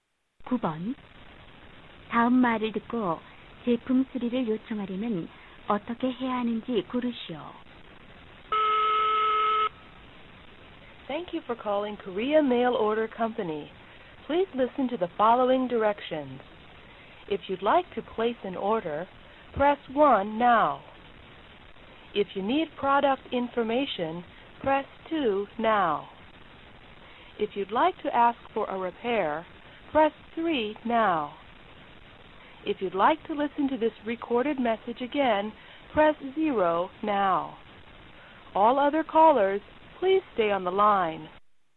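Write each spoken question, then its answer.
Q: 다음 말을 듣고 제품 수리를 요청하려면 어떻게 해야 하는지 고르시오.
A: 3번을 누른다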